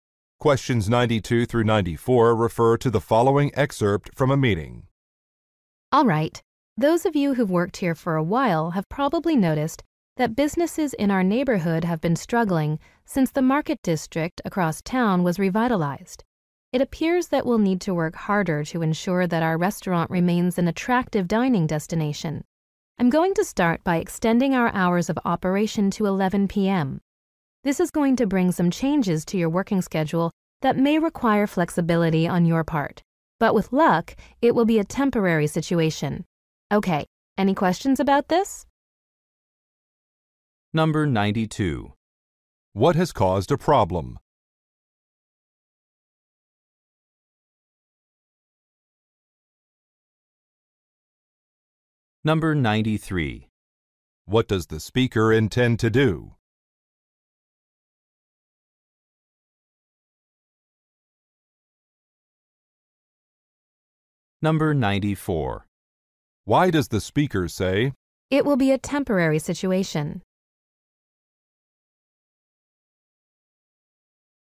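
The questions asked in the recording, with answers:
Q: What has caused a problem?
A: The revitalization of the Market District across town

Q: What does the speaker intend to do?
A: Extend the restaurant's hours to 11 p.m.

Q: Why does the speaker say,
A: To reassure staff that the schedule changes may not last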